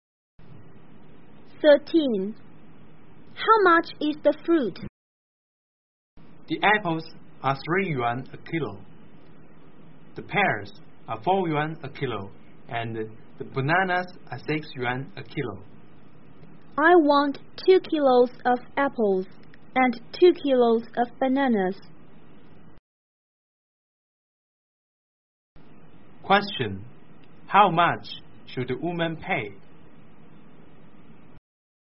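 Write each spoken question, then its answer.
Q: how much should the woman pay?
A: 18 yuan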